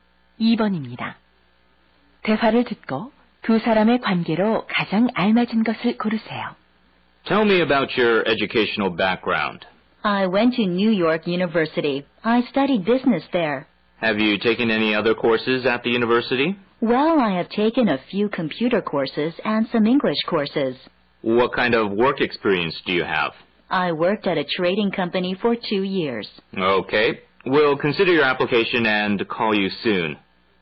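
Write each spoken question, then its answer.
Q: 대화를 듣고 두 사람의 관계로 가장 알맞은 것을 고르세요.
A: 면접관과 지원자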